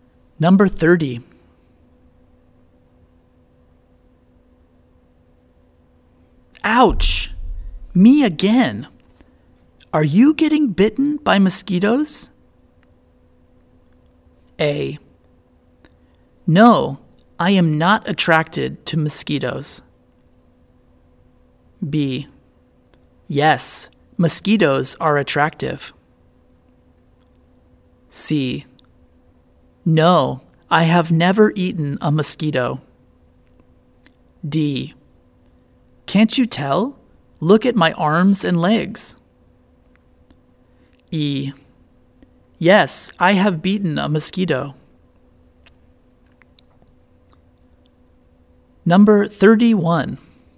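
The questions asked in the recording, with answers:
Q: Are you getting bitten by mosquitoes?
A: D: Can't you tell? Look at my arms and legs.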